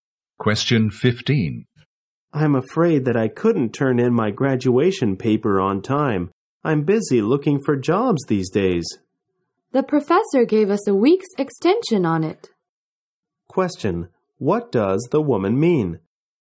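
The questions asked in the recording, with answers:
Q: What does the woman mean?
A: The paper can be handed in a week later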